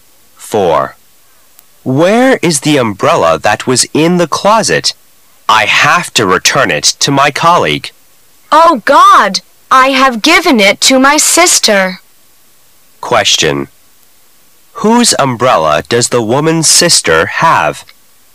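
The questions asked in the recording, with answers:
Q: Whose umbrella does the woman's sister have?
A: The man's colleague's

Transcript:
[解析] M: Where is the umbrella that was in the closet? I have to return it to my colleague. W: Oh, God, I have given it to my sister. Q: Whose umbrella does the woman's sister have?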